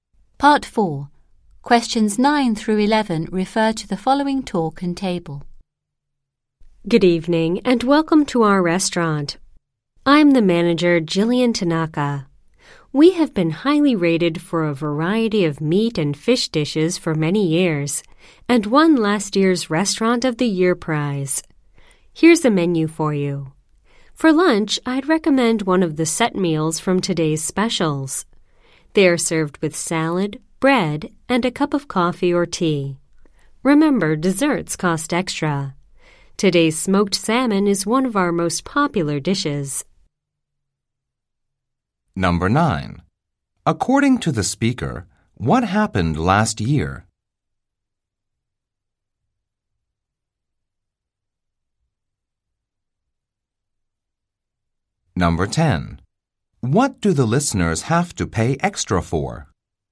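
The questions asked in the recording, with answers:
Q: According to the speaker, what happened last year?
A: The restaurant won the Restaurant of the Year prize.

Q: What do the listeners have to pay extra for?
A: Desserts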